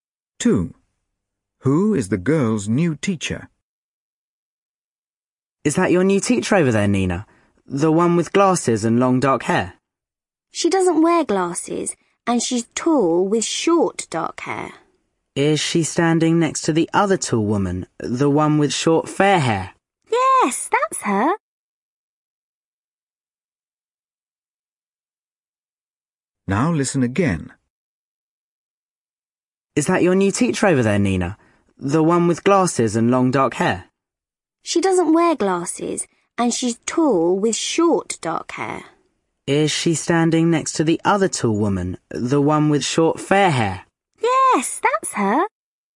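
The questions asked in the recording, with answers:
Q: Who is the girl's new teacher?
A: The tall woman with short dark hair and no glasses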